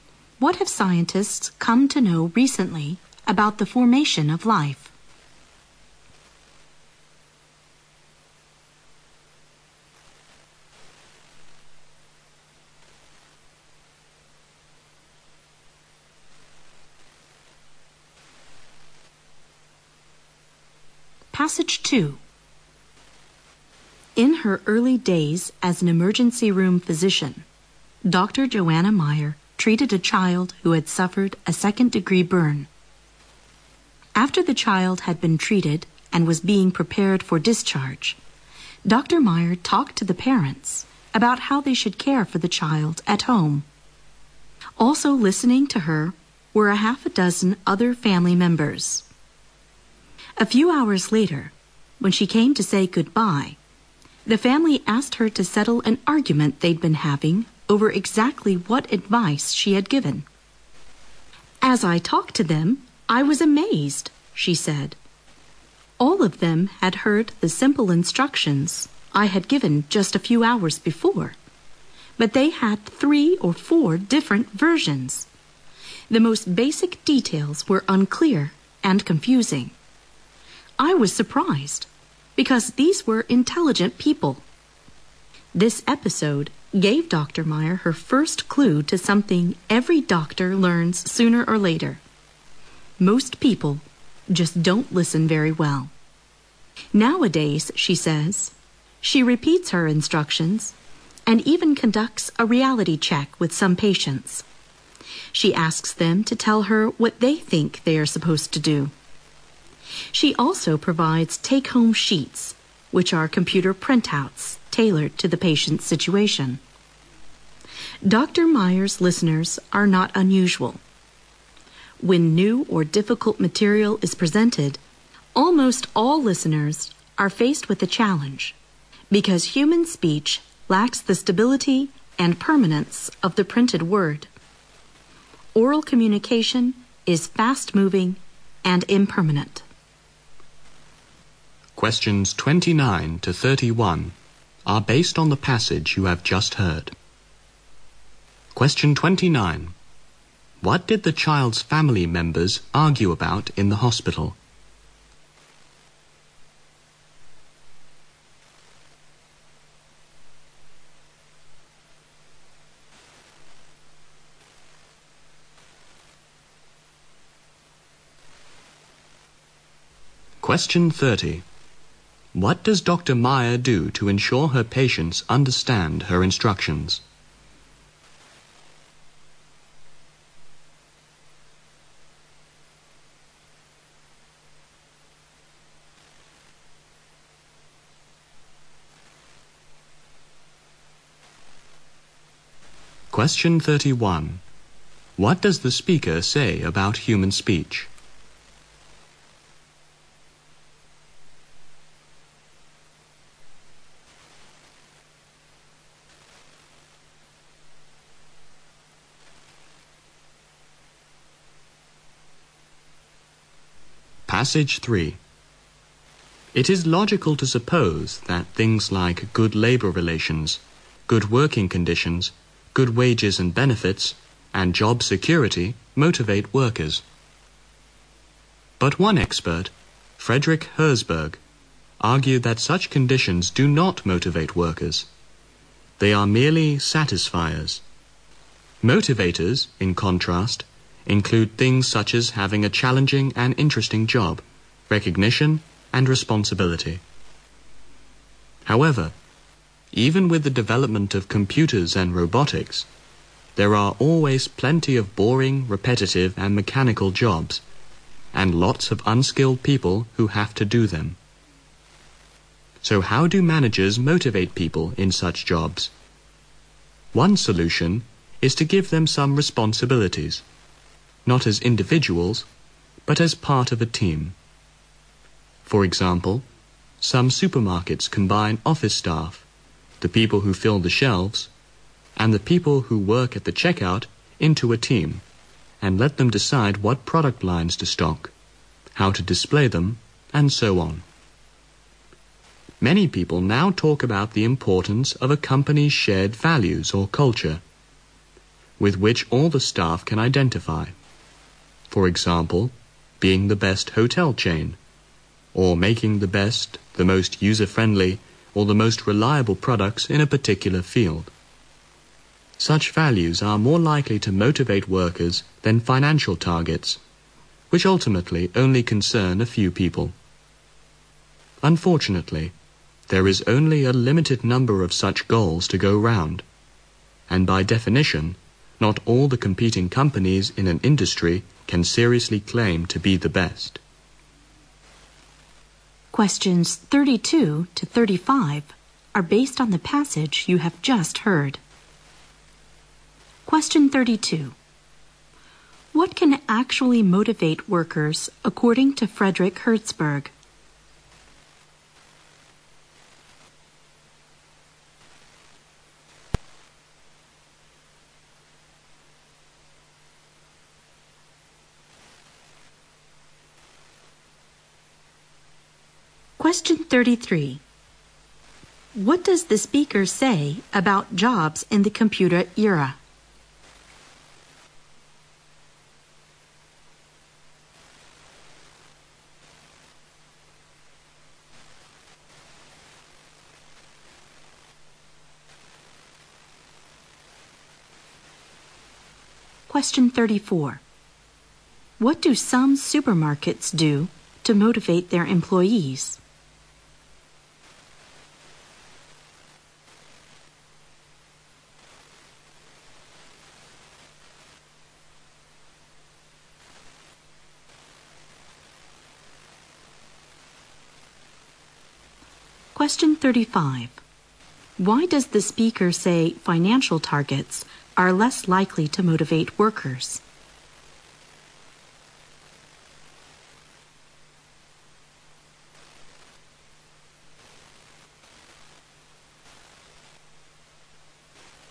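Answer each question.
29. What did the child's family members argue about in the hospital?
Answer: Exactly what advice the doctor had given.

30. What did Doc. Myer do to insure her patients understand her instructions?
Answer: She repeats her instructions, asks patients to say what they will do, and gives take-home sheets.

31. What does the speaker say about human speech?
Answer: It lacks the stability and permanence of the printed word.

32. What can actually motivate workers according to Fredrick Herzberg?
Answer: A challenging and interesting job, recognition and responsibility.

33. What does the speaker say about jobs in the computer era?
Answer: There are still plenty of boring, repetitive and mechanical jobs.

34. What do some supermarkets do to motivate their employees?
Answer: They put staff into teams that decide what products to stock and how to display them.

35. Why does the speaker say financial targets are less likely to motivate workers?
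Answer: They ultimately only concern a few people.

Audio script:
27. What have scientists found about Europa, a moon of Jupiter?
28. What have scientists come to know recently about formation of life?
Passage 2
In her early days as an emergency room physician, Doctor Joanna Myer treated a child who had suffered a second degree burn. After the child had been treated and was being prepared for discharge, Doctor Myer talked to the parents about how they should care for the child at home. Also listening to her were a half a dozen other family members. A few hours later, when she came to say goodbye, the family asked her to settle an argument they'd been having over exactly what advice she had given. "As I talked to them, I was amazed." she said, "All of them had heard the simple instructions I have given just a few hours before, but they have three or four different versions. The most basic details were unclear and confusing. 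I was surprised, because these were intelligent people." This episode gave Doctor Myer her first clue to something every doctor learns sooner or later- most people just don't listen very well. Nowadays, she says she repeats her instructions, and even conducts a reality check with some patients. She asks them to tell her what they think they are supposed to do. She also provides take-home sheets which are computer printouts tailored to the patients' situation. Myer's listeners are not unusual. When new or difficult material is presented, almost all listeners are faced with the challenge because human speech lacks the stability and permanence of the printed word. Oral communication is fast-moving and impermanent.
Question 29 to 31 are based on the passage you have just heard:
Passage 3
It's logical to suppose that things like good labor relations, good working conditions, good wages and benefits and job security motivate workers, but one expert, Fredrick Herzberg argued that such conditions do not motivate workers. 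They are merely satisfiers. Motivators, in contrast, include things such as having a challenging and interesting job, recognition and responsibility. However, even with the development of computers and robotics, there're always plenty of boring, repetitive and mechanical jobs and lots of unskilled people who have to do them. So how do mangers motivate people in such jobs? One solution is to give them some responsibilities, not as individuals, but as a part of a team. For example, some supermarkets can buy office stuff to people who fill the shelves, and the people who work at the check out into a team, and let them decide what product lines to stock, how to display them and so on. Many people now talk about the importance of a company's shared values or culture with which all the staff can identify, for example, being the best hotel chain, or making the best, the most user-friendly or the most reliable products in a particular field. 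Such values are more likely to motivate workers than financial targets which automatically only concern a few people. Unfortunately, there's only a limited number of such goals to go around and by definition, not all the competing companies in that industry can seriously plan to be the best.

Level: 大学英语四级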